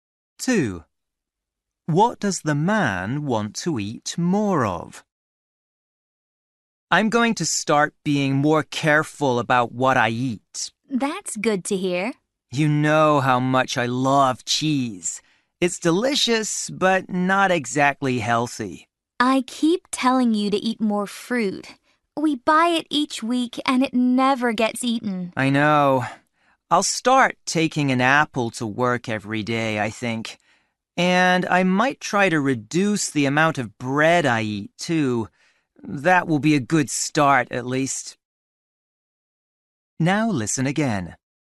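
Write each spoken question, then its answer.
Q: What does the man want to eat more of?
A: Fruit (apples)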